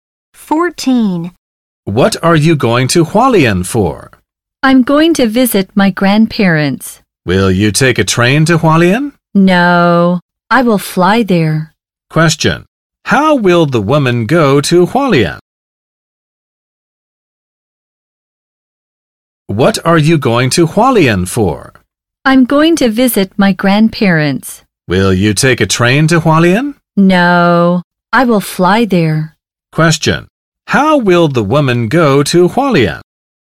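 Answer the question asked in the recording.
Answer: By plane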